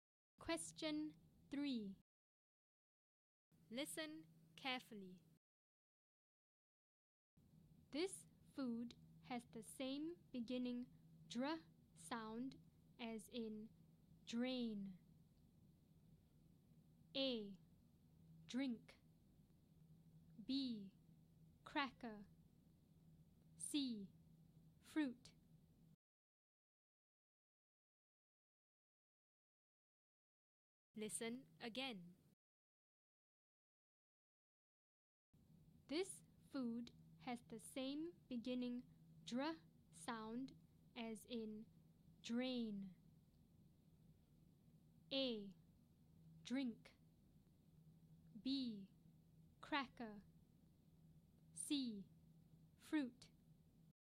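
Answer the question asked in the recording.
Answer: A: Drink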